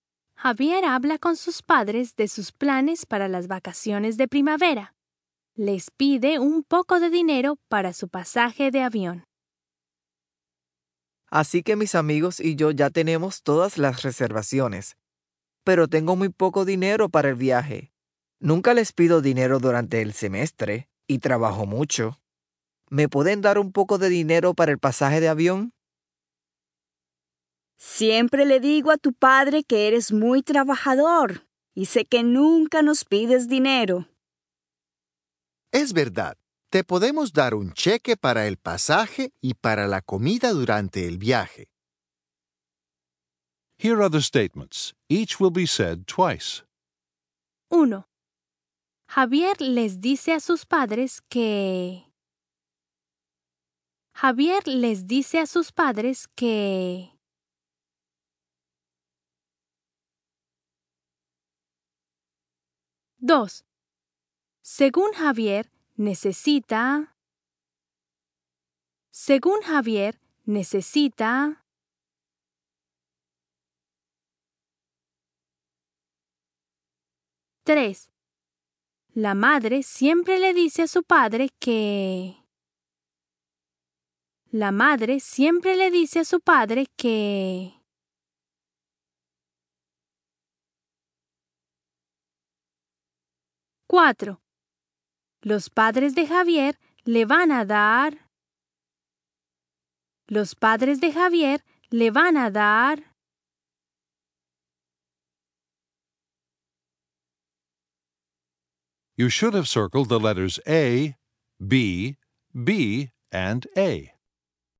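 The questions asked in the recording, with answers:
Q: Según Javier, necesita...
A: un poco de dinero para el pasaje de avión

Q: La madre siempre le dice a su padre que...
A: Javier es muy trabajador

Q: Los padres de Javier le van a dar...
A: un cheque para el pasaje y la comida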